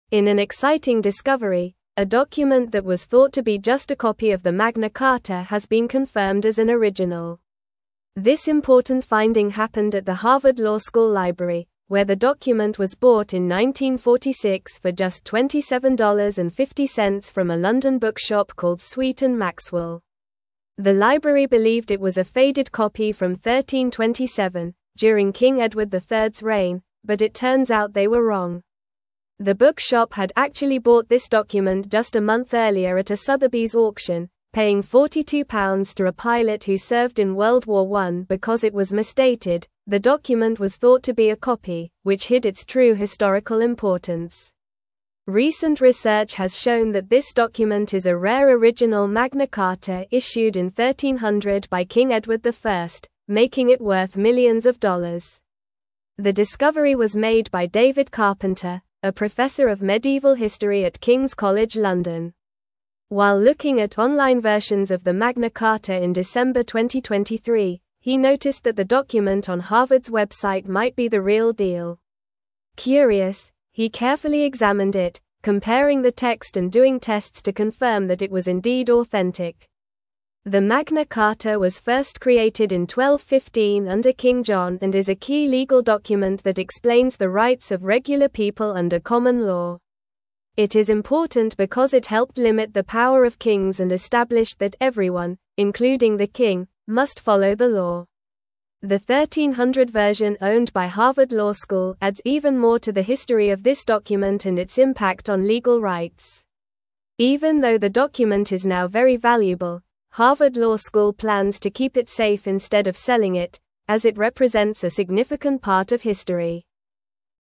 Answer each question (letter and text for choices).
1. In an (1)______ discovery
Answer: exciting

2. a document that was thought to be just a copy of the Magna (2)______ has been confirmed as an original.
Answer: Carta

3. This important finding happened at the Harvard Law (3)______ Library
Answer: School

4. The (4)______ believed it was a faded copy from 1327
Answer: library

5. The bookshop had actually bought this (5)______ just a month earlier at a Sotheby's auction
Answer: document

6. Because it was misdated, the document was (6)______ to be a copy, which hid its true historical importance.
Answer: thought

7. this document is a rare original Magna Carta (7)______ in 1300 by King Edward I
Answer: issued

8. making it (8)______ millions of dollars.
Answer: worth

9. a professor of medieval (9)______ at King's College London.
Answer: history

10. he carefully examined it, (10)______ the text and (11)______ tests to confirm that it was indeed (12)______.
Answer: comparing

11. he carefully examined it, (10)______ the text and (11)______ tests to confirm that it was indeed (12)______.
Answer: doing

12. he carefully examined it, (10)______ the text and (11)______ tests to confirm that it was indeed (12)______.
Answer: authentic

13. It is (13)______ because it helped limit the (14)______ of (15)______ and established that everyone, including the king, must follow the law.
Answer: important

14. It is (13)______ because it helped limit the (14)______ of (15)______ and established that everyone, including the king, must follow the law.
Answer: power

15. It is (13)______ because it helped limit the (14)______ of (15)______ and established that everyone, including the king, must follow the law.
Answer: kings

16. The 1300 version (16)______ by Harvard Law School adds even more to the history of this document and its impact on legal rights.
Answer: owned

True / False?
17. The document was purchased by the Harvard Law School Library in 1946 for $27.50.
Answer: True

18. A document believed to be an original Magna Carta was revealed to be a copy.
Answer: False

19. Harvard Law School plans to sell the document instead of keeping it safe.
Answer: False

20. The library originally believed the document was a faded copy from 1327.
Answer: True

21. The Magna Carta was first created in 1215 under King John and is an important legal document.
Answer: True

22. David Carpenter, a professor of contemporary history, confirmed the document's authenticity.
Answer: False

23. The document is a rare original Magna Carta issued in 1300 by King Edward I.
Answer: True

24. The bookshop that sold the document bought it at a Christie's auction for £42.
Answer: False

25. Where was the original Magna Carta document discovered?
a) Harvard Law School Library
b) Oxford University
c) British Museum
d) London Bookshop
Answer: a) Harvard Law School Library

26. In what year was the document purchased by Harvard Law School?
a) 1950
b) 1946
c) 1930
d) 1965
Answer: b) 1946

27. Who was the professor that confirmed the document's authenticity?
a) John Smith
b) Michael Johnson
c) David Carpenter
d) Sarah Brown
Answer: c) David Carpenter

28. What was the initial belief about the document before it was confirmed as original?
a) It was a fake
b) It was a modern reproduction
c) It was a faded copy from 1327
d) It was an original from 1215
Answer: c) It was a faded copy from 1327

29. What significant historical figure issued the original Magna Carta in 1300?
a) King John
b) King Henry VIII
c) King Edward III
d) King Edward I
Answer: d) King Edward I

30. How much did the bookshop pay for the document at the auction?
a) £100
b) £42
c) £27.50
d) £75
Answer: b) £42

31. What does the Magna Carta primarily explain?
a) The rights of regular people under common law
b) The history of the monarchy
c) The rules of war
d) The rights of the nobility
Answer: a) The rights of regular people under common law

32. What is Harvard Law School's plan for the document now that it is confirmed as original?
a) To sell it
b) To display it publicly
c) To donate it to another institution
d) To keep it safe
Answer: d) To keep it safe

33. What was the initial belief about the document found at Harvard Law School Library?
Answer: The initial belief was that the document was just a faded copy of the Magna Carta from 1327.

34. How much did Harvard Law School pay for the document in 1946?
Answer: Harvard Law School paid $27.50 for the document in 1946.

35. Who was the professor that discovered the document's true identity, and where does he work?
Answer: The professor is David Carpenter, and he works at King's College London.

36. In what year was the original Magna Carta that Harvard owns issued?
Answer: The original Magna Carta that Harvard owns was issued in 1300.

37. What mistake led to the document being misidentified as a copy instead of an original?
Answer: The document was misidentified as a copy because it was misdated, leading people to believe it was a faded copy from 1327.

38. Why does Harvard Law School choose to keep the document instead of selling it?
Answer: Harvard Law School chooses to keep the document because it represents a significant part of history.

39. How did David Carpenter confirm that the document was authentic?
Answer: David Carpenter confirmed the document's authenticity by carefully examining it, comparing the text, and doing tests.

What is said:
In an exciting discovery, a document that was thought to be just a copy of the Magna Carta has been confirmed as an original. This important finding happened at the Harvard Law School Library, where the document was bought in 1946 for just $27.50 from a London bookshop called Sweet & Maxwell. The library believed it was a faded copy from 1327, during King Edward III's reign, but it turns out they were wrong.
The bookshop had actually bought this document just a month earlier at a Sotheby's auction, paying £42 to a pilot who served in World War I. Because it was misdated, the document was thought to be a copy, which hid its true historical importance. Recent research has shown that this document is a rare original Magna Carta issued in 1300 by King Edward I, making it worth millions of dollars.
The discovery was made by David Carpenter, a professor of medieval history at King's College London. While looking at online versions of the Magna Carta in December 2023, he noticed that the document on Harvard's website might be the real deal. Curious, he carefully examined it, comparing the text and doing tests to confirm that it was indeed authentic.
The Magna Carta was first created in 1215 under King John and is a key legal document that explains the rights of regular people under common law. It is important because it helped limit the power of kings and established that everyone, including the king, must follow the law. The 1300 version owned by Harvard Law School adds even more to the history of this document and its impact on legal rights. Even though the document is now very valuable, Harvard Law School plans to keep it safe instead of selling it, as it represents a significant part of history.

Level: Level 3